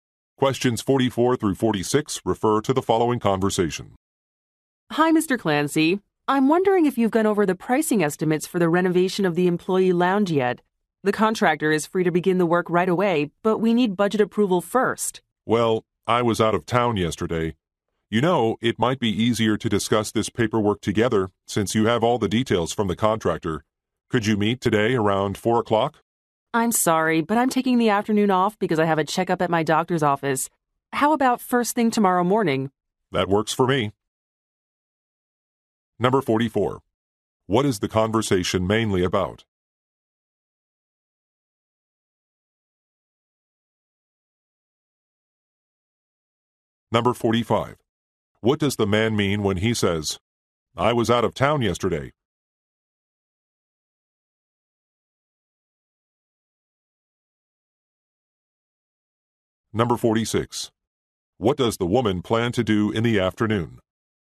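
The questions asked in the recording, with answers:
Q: What is the conversation mainly about?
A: Pricing estimates for a lounge renovation

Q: What does the man mean when he says, "I was out of town yesterday"?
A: He has not reviewed the estimates yet

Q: What does the woman plan to do in the afternoon?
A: Go to a doctor's checkup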